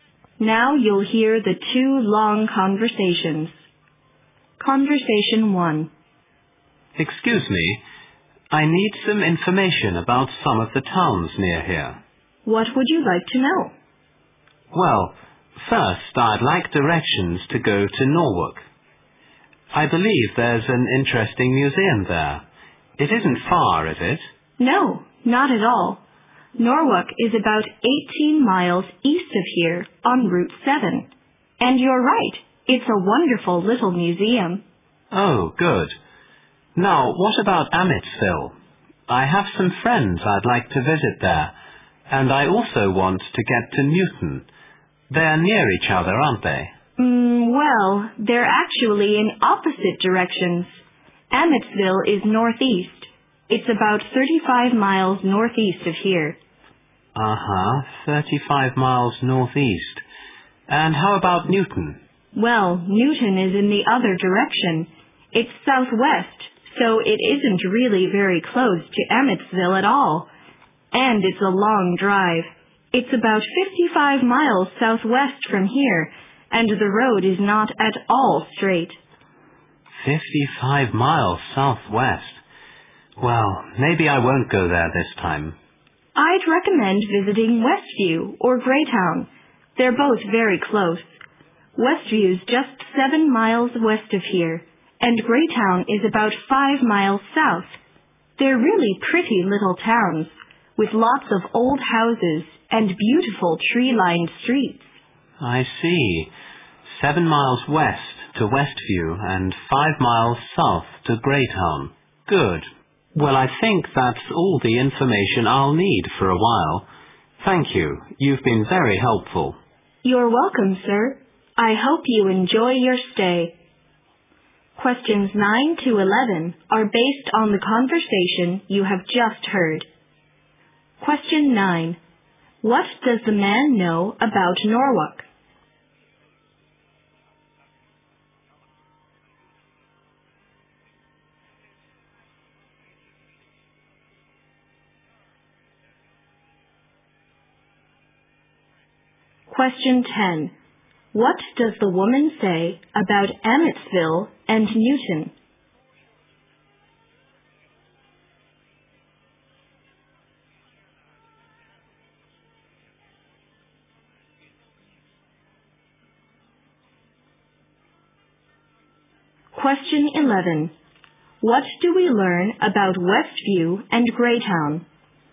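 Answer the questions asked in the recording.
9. It has an interesting museum
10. They are in opposite directions
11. They are close by and pretty, with old houses and tree-lined streets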